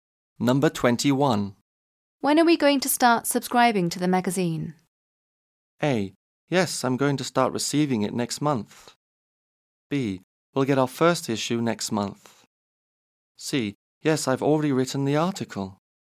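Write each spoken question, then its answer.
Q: When are we going to start subscribing to the magazine?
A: B: We'll get our first issue next month.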